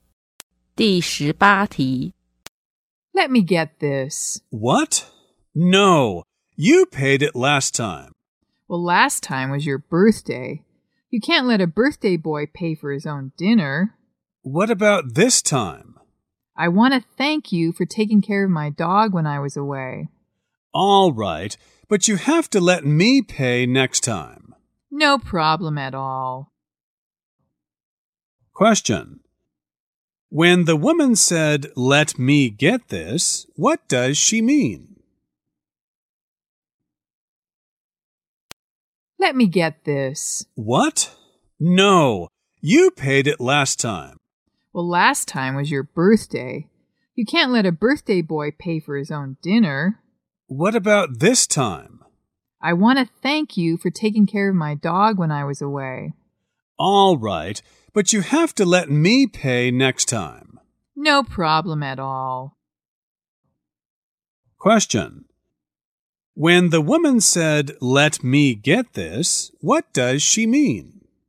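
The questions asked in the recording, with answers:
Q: When the woman said, let me get this, what does she mean?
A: She wants to pay for the dinner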